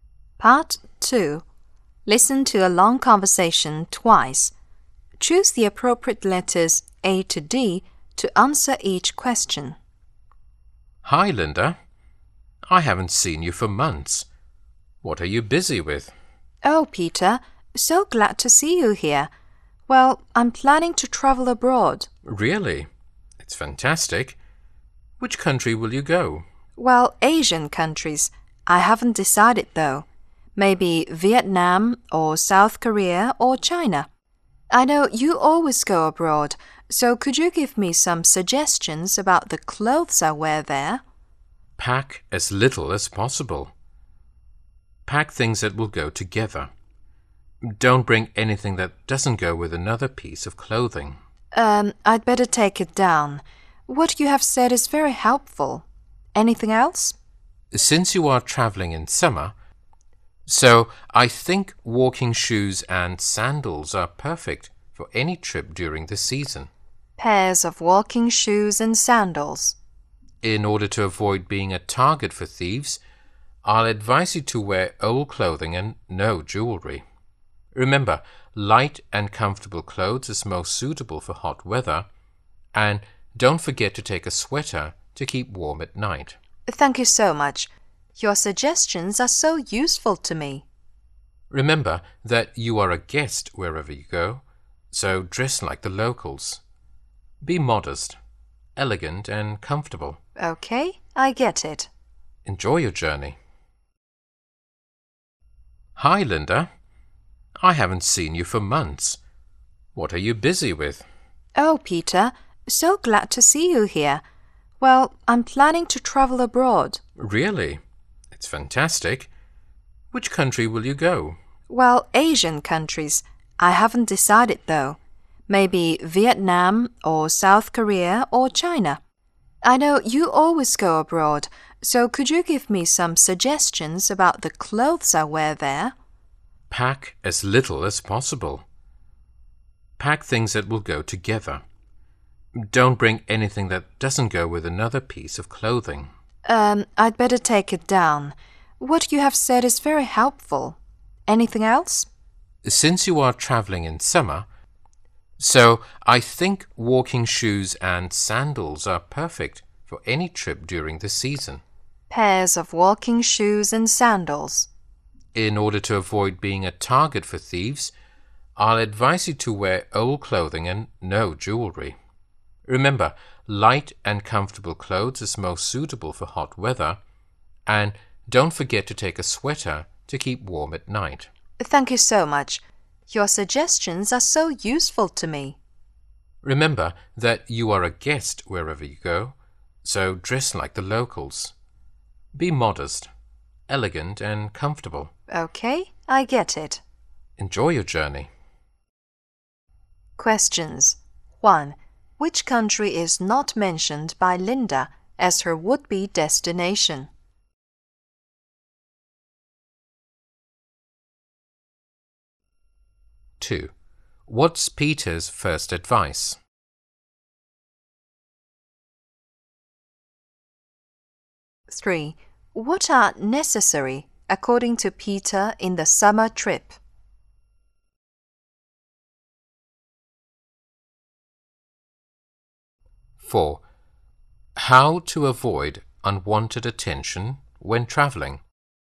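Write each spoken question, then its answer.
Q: What's Peter's first advice?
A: Pack as little as possible.

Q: What are necessary, according to Peter, in the summer trip?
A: Walking shoes and sandals.

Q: How to avoid unwanted attention when traveling?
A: Wear old clothing and no jewelry.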